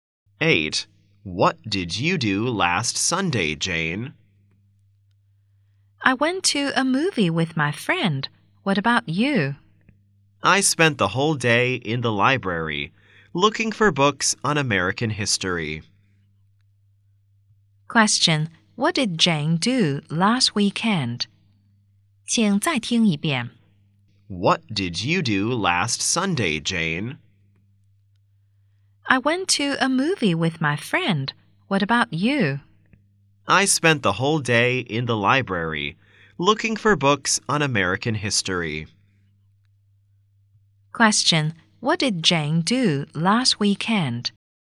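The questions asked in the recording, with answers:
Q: Question. What did Jane do last weekend?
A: She went to a movie with her friend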